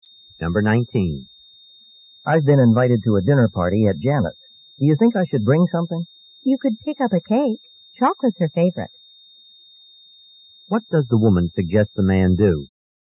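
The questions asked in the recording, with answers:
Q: What does the woman suggest the man do?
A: Bring a chocolate cake.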